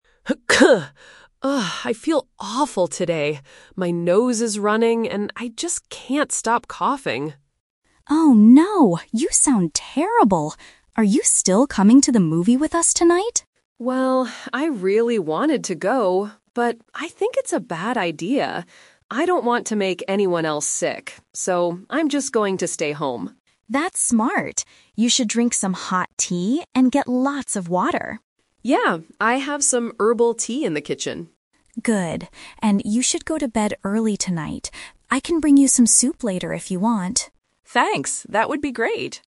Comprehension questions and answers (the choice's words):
Listen to a conversation between two roommates. Choose the correct answer (A, B, or C) for each question.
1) What is the sick roommate going to do tonight?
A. Go to a movie with friends.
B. Go to the pharmacy for medicine.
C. Stay home and rest.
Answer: Stay home and rest.

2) What advice does the healthy roommate give?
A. Drink hot tea and sleep early.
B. Take some cold medicine and sleep.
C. Go to the kitchen to cook soup.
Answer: Drink hot tea and sleep early.

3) What will the healthy roommate do later?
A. Buy some herbal tea at the store.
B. Bring some soup for her friend.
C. Stay home to watch the movie.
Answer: Bring some soup for her friend.

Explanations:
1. The sick roommate says, "I'm just going to stay home."
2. The healthy roommate says, "You should drink some hot tea" and "you should go to bed early tonight."
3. The healthy roommate says, "I can bring you some soup later if you want."

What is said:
Roommate 1: Ugh, I feel awful today. My nose is running and I just can't stop coughing.
Roommate 2: Oh no. You sound terrible. Are you still coming to the movie with us tonight?
Roommate 1: Well, I really wanted to go, but I think it's a bad idea. I don't want to make anyone else sick. So, I'm just going to stay home.
Roommate 2: That's smart. You should drink some hot tea and get lots of water.
Roommate 1: Yeah, I have some herbal tea in the kitchen.
Roommate 2: Good. And you should go to bed early tonight. I can bring you some soup later if you want.